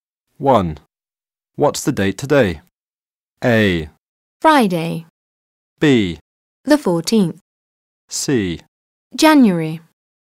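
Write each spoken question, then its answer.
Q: What's the date today?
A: B: The 14th.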